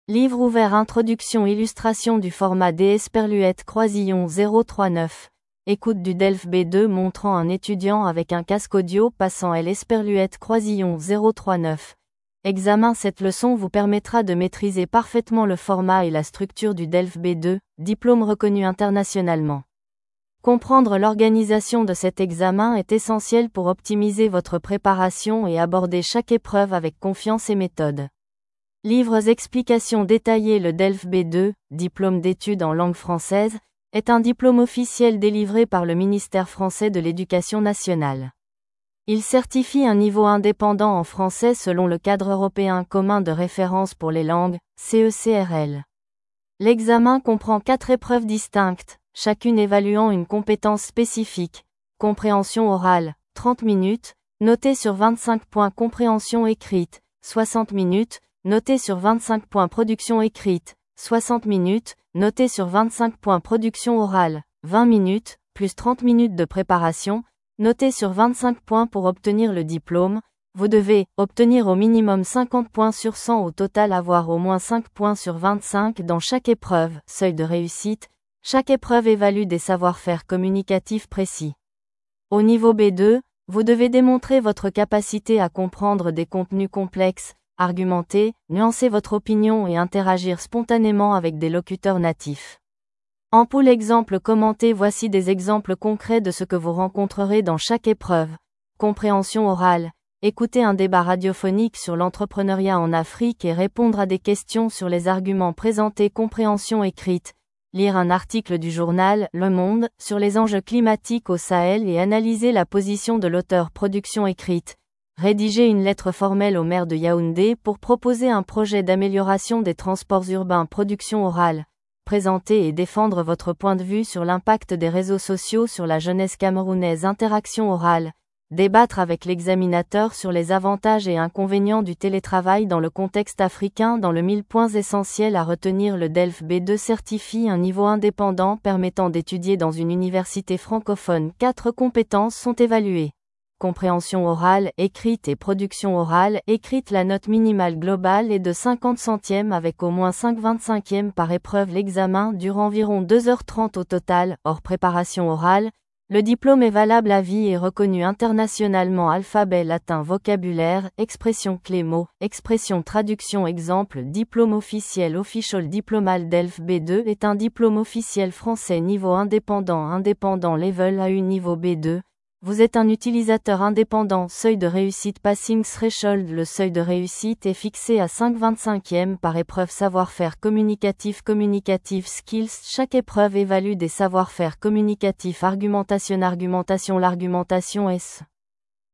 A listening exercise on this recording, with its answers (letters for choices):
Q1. Combien d'épreuves comprend le DELF B2 ?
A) 2 épreuves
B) 3 épreuves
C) 4 épreuves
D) 5 épreuves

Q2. Quel est le score minimum requis pour obtenir le diplôme ?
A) 50/100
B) 60/100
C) 70/100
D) 80/100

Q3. Quelle est la durée de l'épreuve de compréhension écrite ?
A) 30 minutes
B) 45 minutes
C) 60 minutes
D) 90 minutes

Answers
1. C
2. A
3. C

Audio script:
📖 Introduction
Illustration du format d'écoute du DELF B2 montrant un étudiant avec un casque audio passant l'examen
Cette leçon vous permettra de maîtriser parfaitement le format et la structure du DELF B2, diplôme reconnu internationalement. Comprendre l'organisation de cet examen est essentiel pour optimiser votre préparation et aborder chaque épreuve avec confiance et méthode.
📚 Explications détaillées
Le DELF B2 (Diplôme d'Études en Langue Française) est un diplôme officiel délivré par le Ministère français de l'Éducation nationale. Il certifie un niveau indépendant en français selon le Cadre européen commun de référence pour les langues (CECRL).
L'examen comprend quatre épreuves distinctes, chacune évaluant une compétence spécifique :
Compréhension orale : 30 minutes, notée sur 25 points
Compréhension écrite : 60 minutes, notée sur 25 points
Production écrite : 60 minutes, notée sur 25 points
Production orale : 20 minutes (+ 30 min de préparation), notée sur 25 points
Pour obtenir le diplôme, vous devez :
Obtenir au minimum 50 points sur 100 au total
Avoir au moins 5 points sur 25 dans chaque épreuve (seuil de réussite)
Chaque épreuve évalue des savoir-faire communicatifs précis. Au niveau B2, vous devez démontrer votre capacité à comprendre des contenus complexes, argumenter, nuancer votre opinion et interagir spontanément avec des locuteurs natifs.
Voici des exemples concrets de ce que vous rencontrerez dans chaque épreuve :
Compréhension orale : Écouter un débat radiophonique sur l'entrepreneuriat en Afrique et répondre à des questions sur les arguments présentés
Compréhension écrite : Lire un article du journal "Le Monde" sur les enjeux climatiques au Sahel et analyser la position de l'auteur
Production écrite : Rédiger une lettre formelle au maire de Yaoundé pour proposer un projet d'amélioration des transports urbains
Production orale : Présenter et défendre votre point de vue sur l'impact des réseaux sociaux sur la jeunesse camerounaise
Interaction orale : Débattre avec l'examinateur sur les avantages et inconvénients du télétravail dans le contexte africain
🎯 Points essentiels à retenir
Le DELF B2 certifie un niveau indépendant permettant d'étudier dans une université francophone
Quatre compétences sont évaluées : compréhension orale/écrite et production orale/écrite
La note minimale globale est de 50/100 avec au moins 5/25 par épreuve
L'examen dure environ 2h30 au total (hors préparation orale)
Le diplôme est valable à vie et reconnu internationalement
Traduction
Exemple
Diplôme officiel
Au niveau B2, vous êtes un utilisateur indépendant
Seuil de réussite
Passing threshold
Le seuil de réussite est fixé à 5/25 par épreuve
Savoir-faire communicatif
Communicative skills

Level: DELF B2